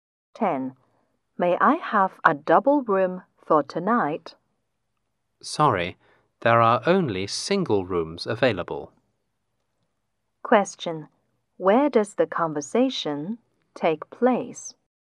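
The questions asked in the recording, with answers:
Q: Where does the conversation take place?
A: In a hotel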